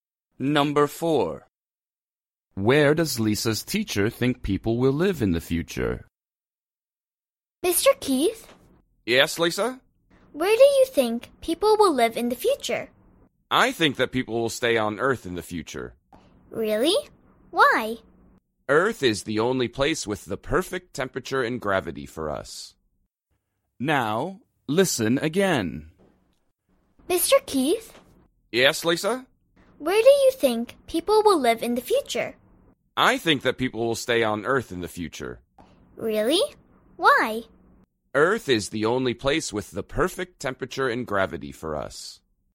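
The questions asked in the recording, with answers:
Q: Where does Lisa's teacher think people will live in the future?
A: on Earth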